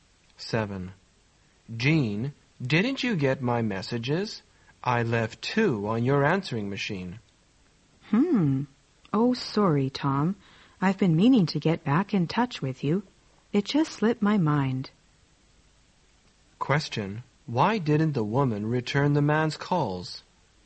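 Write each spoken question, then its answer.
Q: Why didn't the woman return the man's calls?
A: She forgot.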